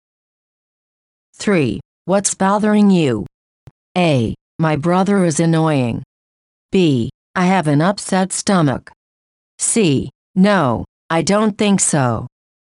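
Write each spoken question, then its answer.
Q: What's bothering you?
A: B: I have an upset stomach.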